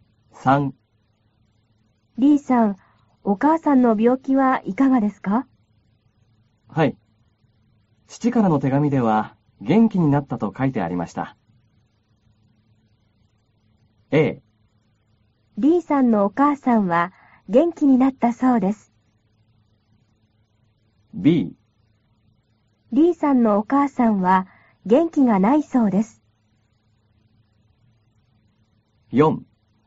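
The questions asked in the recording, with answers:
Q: A。リーさんのお母さんは元気になったそうです。B。リーさんのお母さんは元気がないそうです。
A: A: リーさんのお母さんは元気になったそうです。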